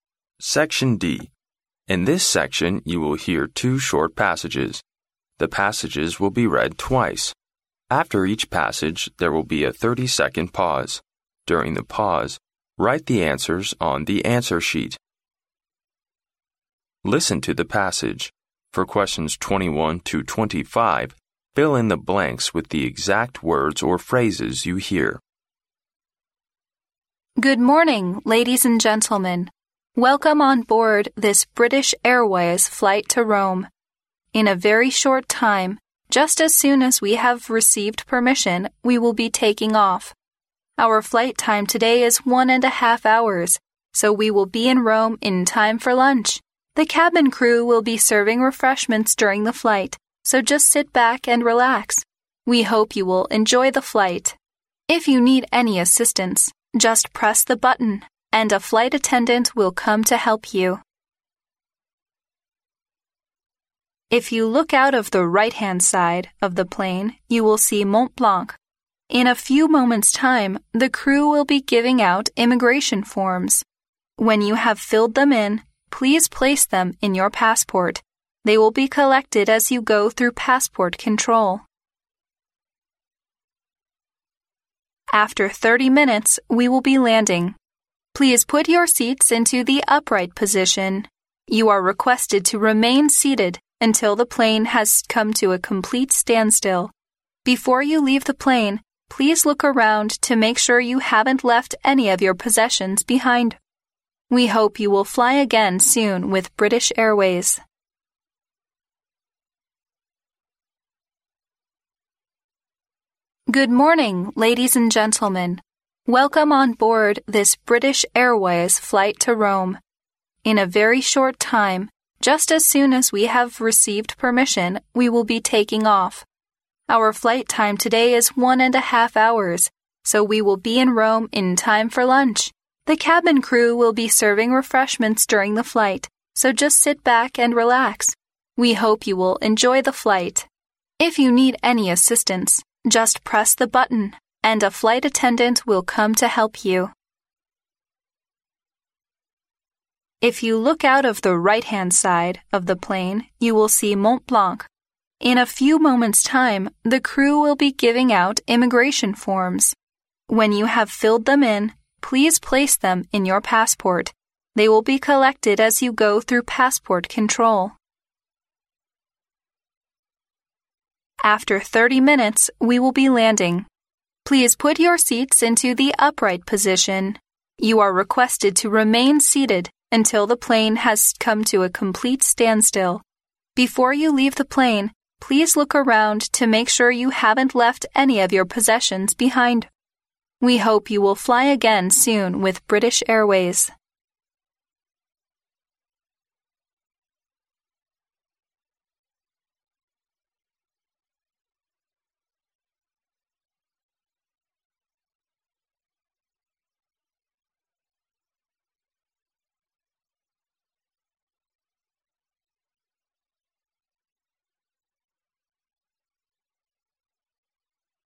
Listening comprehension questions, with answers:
Listen to the passage. For questions 21—25, fill in the blanks with the exact words or phrases you hear.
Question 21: In a very short time, just as soon as we (21) _____, we will be taking off.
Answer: have received permission

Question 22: If you need (22) _____, just press the button and a flight attendant will come to help you.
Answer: any assistance

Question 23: In a few moments' time, the crew will be giving out (23) _____.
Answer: immigration forms

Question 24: You are requested to (24) _____ until the plane has come to a complete standstill.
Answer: remain seated

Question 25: Before you leave the plane, please look around to make sure you haven't left any of (25) _____behind.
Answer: your possessions

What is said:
In this section, you will hear two short passages. The passages will be read twice. After each passage, there will be a thirty-second pause. During the pause, write the answers on the answer sheet.
Listen to the passage. For questions 21—25, fill in the blanks with the exact words or phrases you hear.
Good morning, ladies and gentlemen. Welcome on board this British Airways flight to Rome. In a very short time, just as soon as we have received permission , we will be taking off. Our flight time today is one and a half hours, so we will be in Rome in time for lunch! The cabin crew will be serving refreshments during the flight, so just sit back and relax. We hope you will enjoy the flight. If you need any assistance , just press the button and a flight attendant will come to help you.
If you look out of the right-hand side of the plane, you will see Mont Blanc. In a few moments' time, the crew will be giving out immigration forms . When you have filled them in, please place them in your passport. They will be collected as you go through passport control.
After thirty minutes we will be landing. Please put your seats into the upright position. You are requested to remain seated until the plane has come to a complete standstill. Before you leave the plane, please look around to make sure you haven't left any of your possessions behind. We hope you will fly again soon with British Airways.